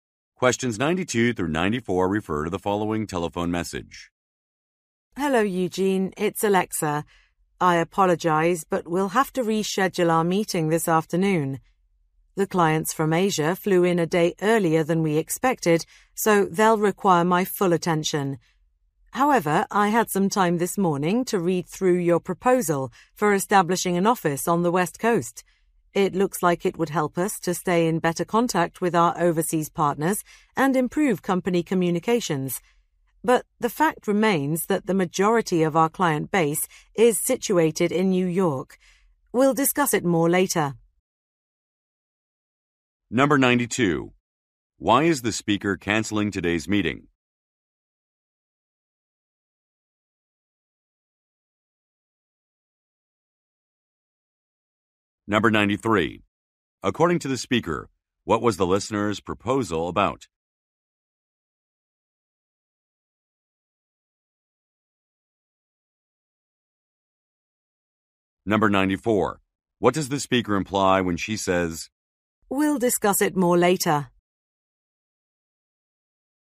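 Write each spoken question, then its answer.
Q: Why is the speaker canceling today's meeting?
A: Clients from Asia arrived a day early

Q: According to the speaker, what was the listener's proposal about?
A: Opening an office on the West Coast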